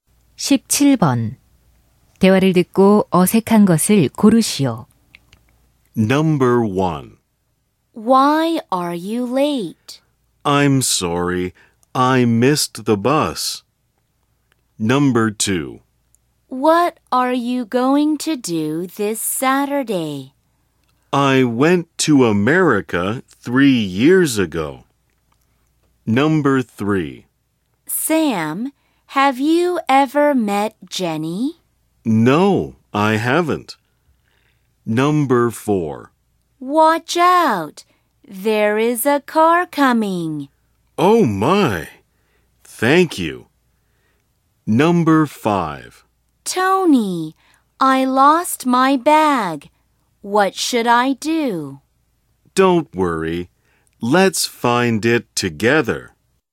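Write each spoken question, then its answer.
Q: 대화를 듣고 어색한 것을 고르시오.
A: 2: What are you going to do this Saturday? / I went to America 3 years ago.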